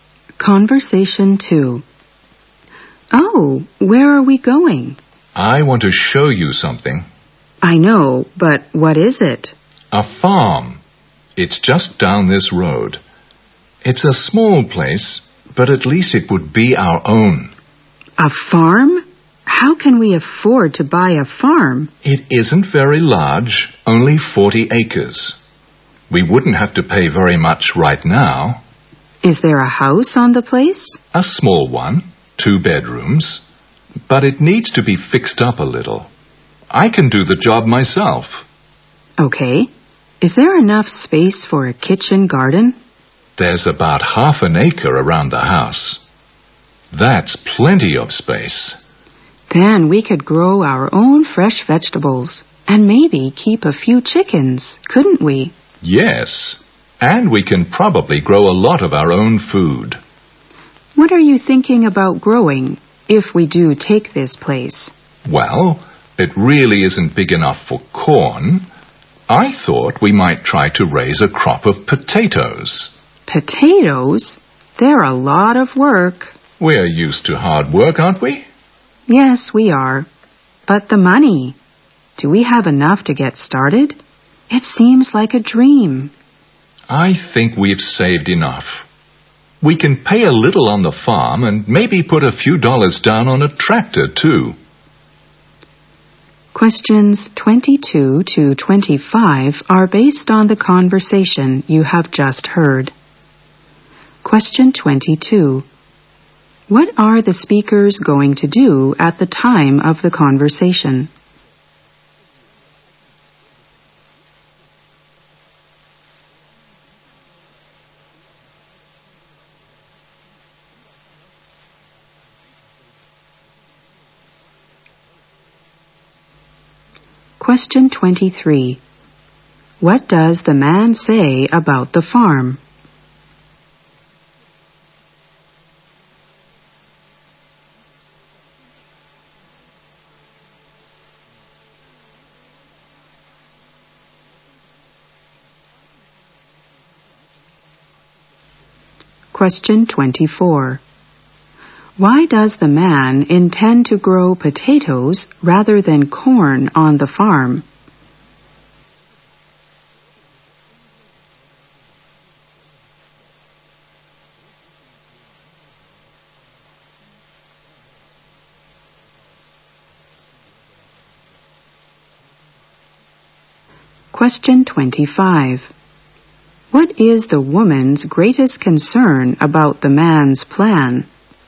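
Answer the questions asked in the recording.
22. Go and see a farm
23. It is small, only 40 acres, and they can afford it.
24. The farm isn't big enough for corn.
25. Whether they have enough money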